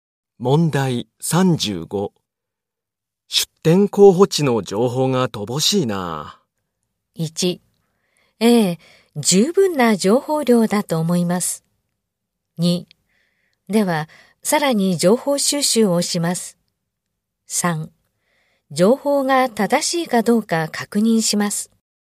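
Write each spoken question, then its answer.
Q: 出展候補地の情報が乏しいな。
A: 2: では、さらに情報収集をします。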